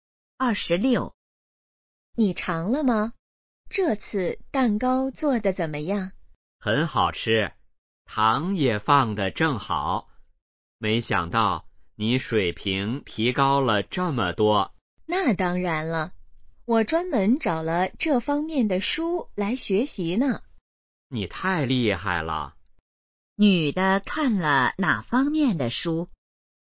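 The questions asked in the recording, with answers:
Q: 女的看了哪方面的书?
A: 做蛋糕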